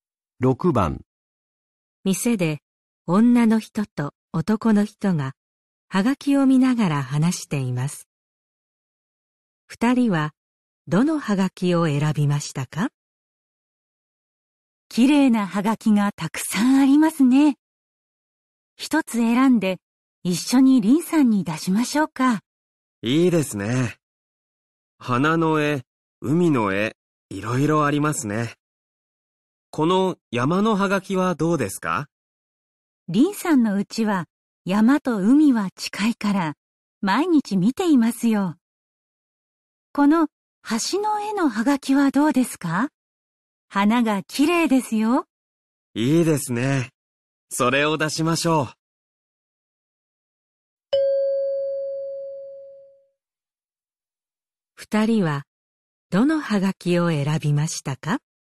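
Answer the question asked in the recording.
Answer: 橋の絵のはがき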